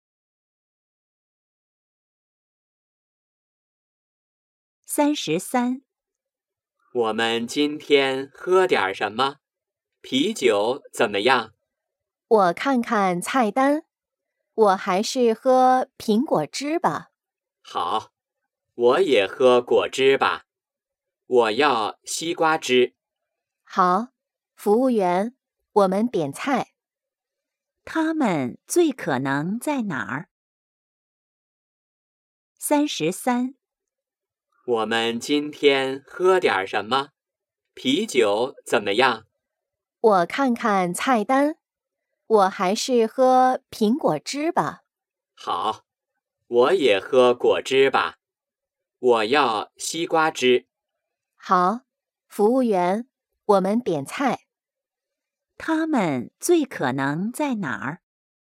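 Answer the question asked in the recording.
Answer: 饭馆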